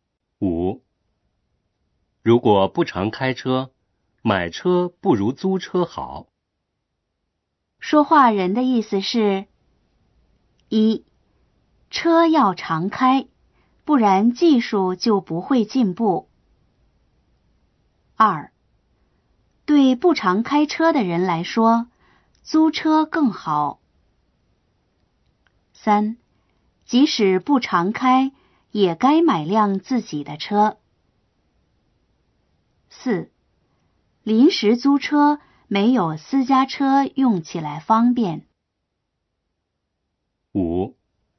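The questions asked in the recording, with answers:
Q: 说话人的意思是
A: 2: 对不常开车的人来说,租车更好。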